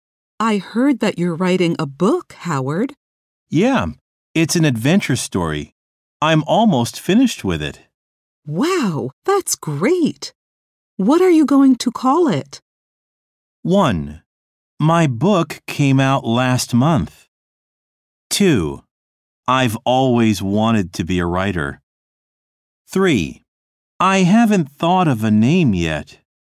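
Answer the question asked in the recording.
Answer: 3: I haven't thought of a name yet.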